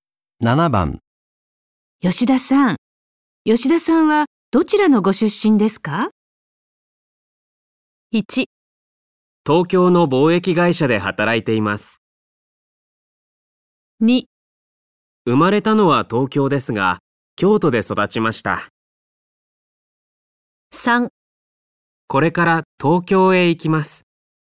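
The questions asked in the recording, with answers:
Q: 吉田さん。吉田さんはどちらのご出身ですか?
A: 2: 生まれたのは東京ですが、京都で育ちました。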